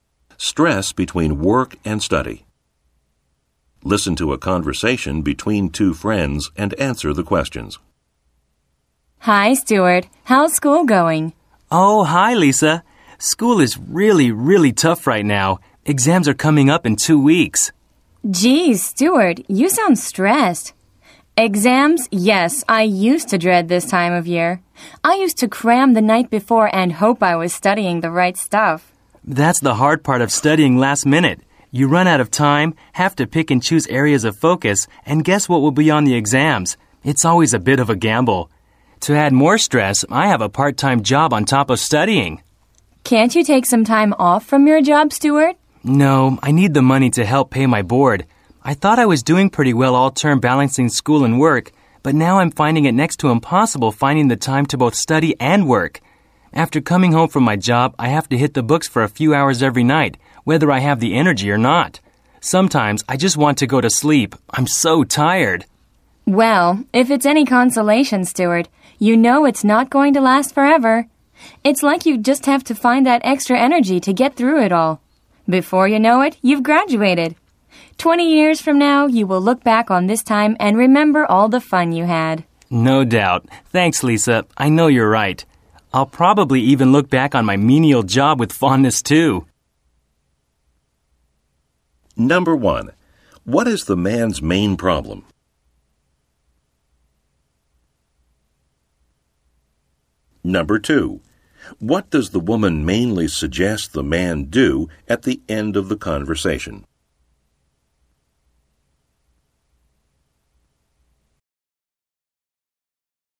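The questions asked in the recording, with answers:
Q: What is the man's main problem?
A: He is stressed balancing studying for exams with his part-time job.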